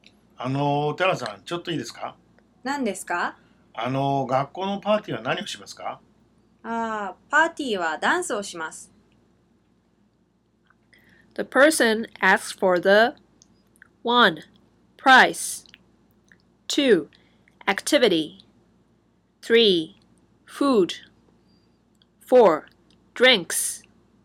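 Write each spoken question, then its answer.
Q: The person asks for the 1. Price 2. Activity 3. Food 4. Drinks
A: 2: Activity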